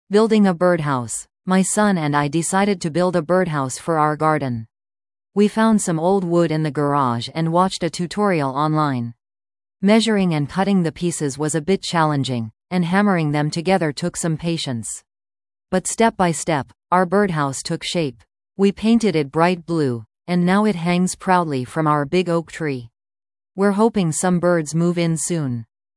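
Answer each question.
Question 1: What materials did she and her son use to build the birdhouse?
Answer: Old wood from the garage

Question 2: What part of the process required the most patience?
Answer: Hammering the pieces together

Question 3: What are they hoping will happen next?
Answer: That some birds move in soon

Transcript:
Building a Birdhouse
My son and I decided to build a birdhouse for our garden. We found some old wood in the garage and watched a tutorial online. Measuring and cutting the pieces was a bit challenging, and hammering them together took some patience. But step by step, our birdhouse took shape. We painted it bright blue, and now it hangs proudly from our big oak tree. We're hoping some birds move in soon!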